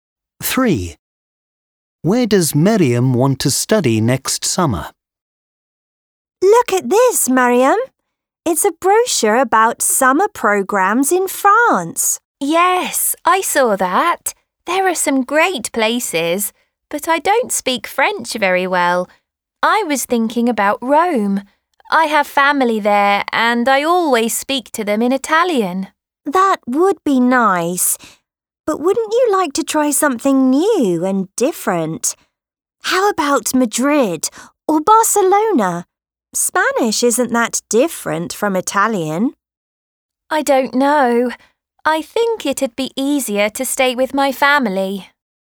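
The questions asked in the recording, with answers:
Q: Where does Maryam want to study next summer?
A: Rome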